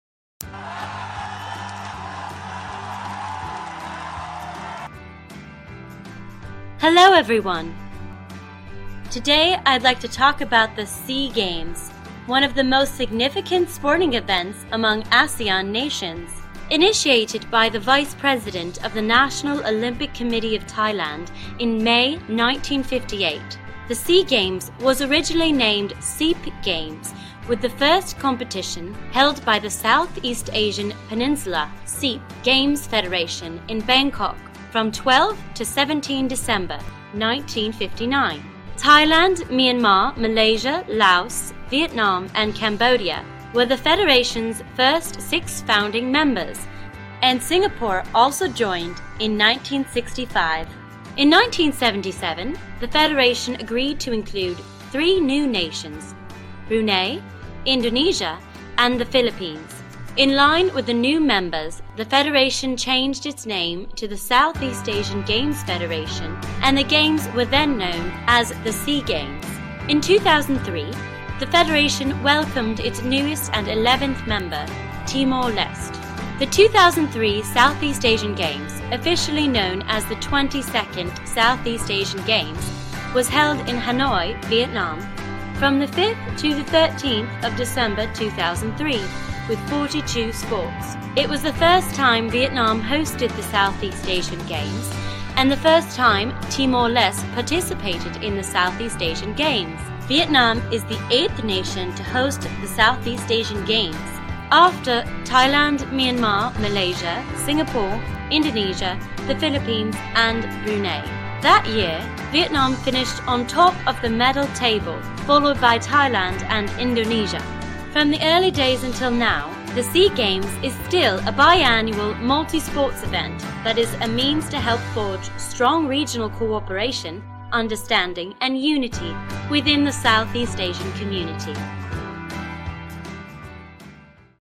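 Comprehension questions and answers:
Task: Complete the table below.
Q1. First held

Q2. First name of the Games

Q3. Number of founding members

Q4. Newest member country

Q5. Host country of the 22nd SEA Games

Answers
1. 1959
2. SEAP Games
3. six
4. Timor-Leste
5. Vietnam

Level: lớp 11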